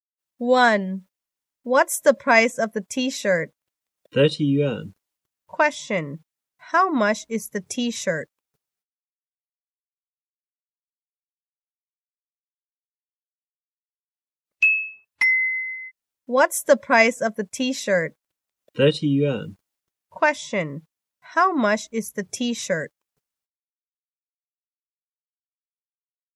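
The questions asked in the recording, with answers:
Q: How much is the t-shirt?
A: 30 yuan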